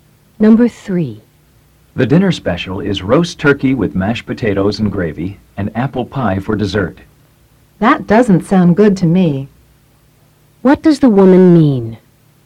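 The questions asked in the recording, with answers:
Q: What does the woman mean?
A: She doesn't want the dinner special.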